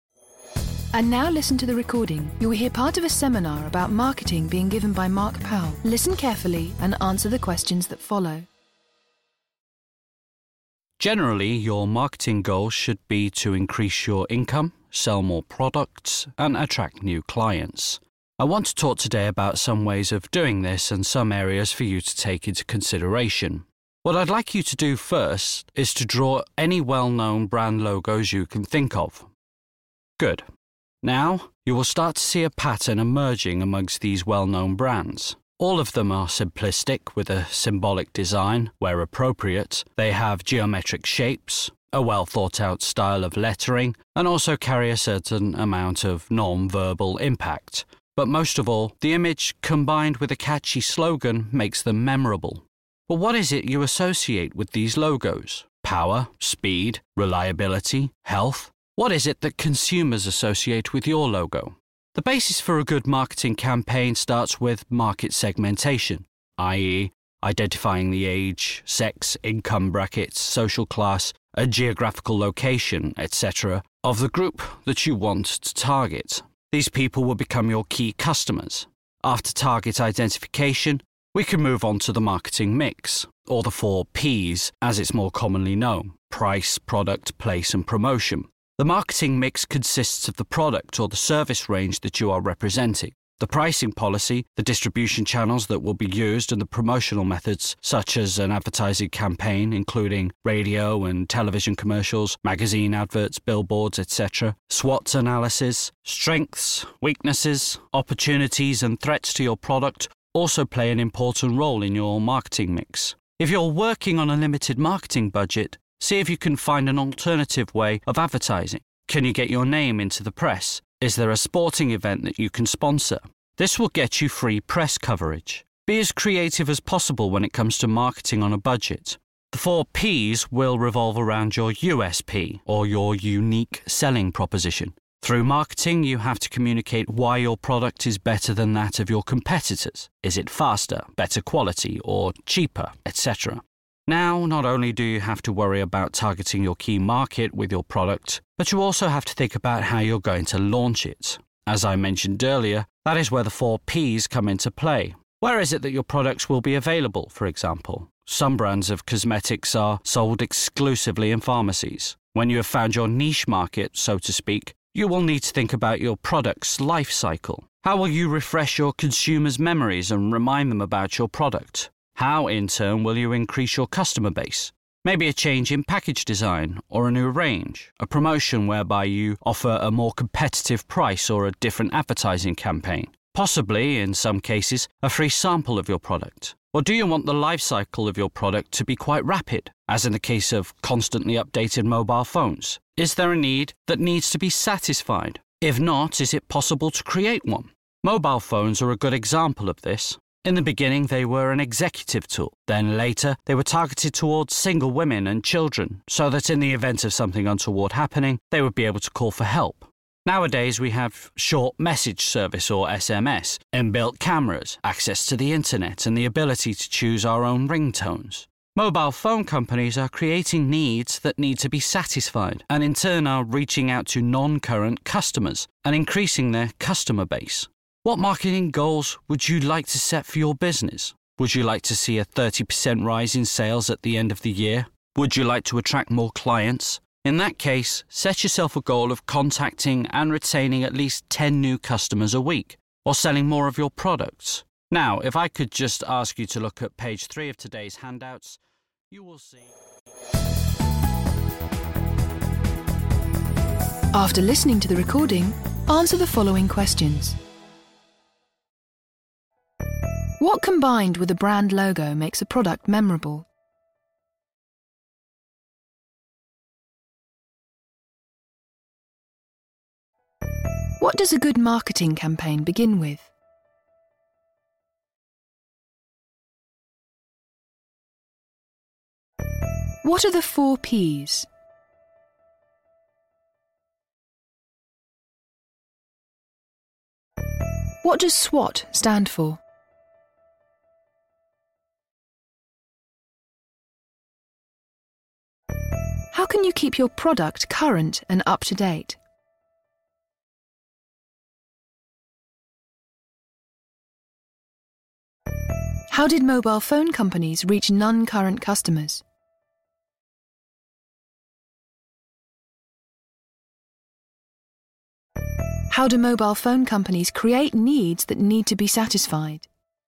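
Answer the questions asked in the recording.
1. A catchy slogan
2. Market segmentation
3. Price, product, place and promotion
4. Strengths, weaknesses, opportunities and threats
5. With a change in package design, a new range, a price promotion, a different advertising campaign or free samples
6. By creating new needs and targeting new groups, such as single women and children
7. By adding new features such as SMS, built-in cameras, internet access and choice of ringtones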